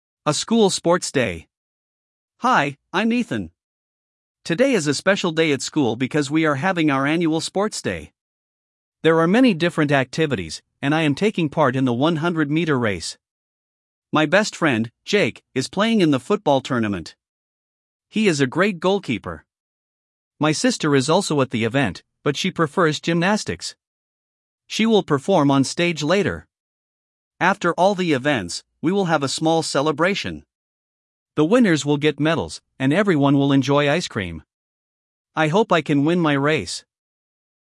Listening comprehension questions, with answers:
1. What event is Ethan participating in?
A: 100-meter race

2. What sport does Jake play?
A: Football

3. What does Ethan's sister prefer?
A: Gymnastics

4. What will the winners receive?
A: A medal

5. What will everyone enjoy after the events?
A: Ice cream

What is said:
«A School Sports Day»
Hi, I'm Ethan! Today is a special day at school because we are having our annual Sports Day. There are many different activities, and I am taking part in the 100-meter race.
My best friend, Jake, is playing in the football tournament. He is a great goalkeeper. My sister is also at the event, but she prefers gymnastics. She will perform on stage later.
After all the events, we will have a small celebration. The winners will get medals, and everyone will enjoy ice cream. I hope I can win my race!

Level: 4 класс